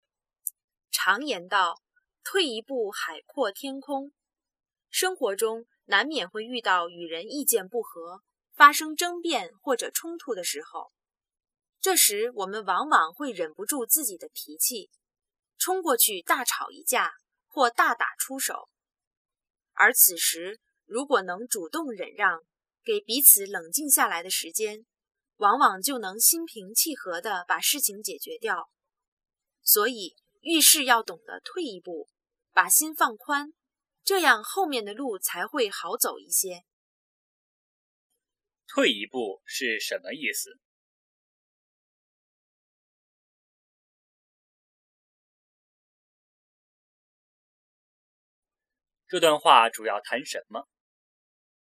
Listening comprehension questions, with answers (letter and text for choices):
请选出正确答案。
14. "退一步"是什么意思?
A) 主动忍让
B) 向后走一步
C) 准备冲过去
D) 只吵架不打人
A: A) 主动忍让

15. 这段话主要谈什么?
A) 贵在行动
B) 欲速则不达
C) 性格决定命运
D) 退一步海阔天空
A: D) 退一步海阔天空

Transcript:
常言道:"退一步海阔天空。"生活中难免会遇到与人意见不合,发生争辩或者冲突的时候,这时我们往往会忍不住自己的脾气,冲过去大吵一架或大打出手。而此时如果能主动忍让,给彼此冷静下来的时间,往往就能心平气和地把事情解决掉。所以遇事要懂得退一步,把心放宽,这样后面的路才会好走一些。

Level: 汉语水平考试(HSK)五级